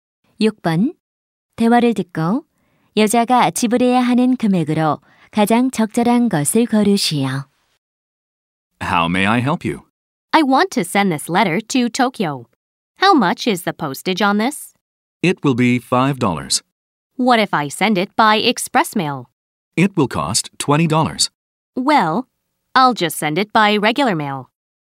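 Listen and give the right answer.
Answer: 5달러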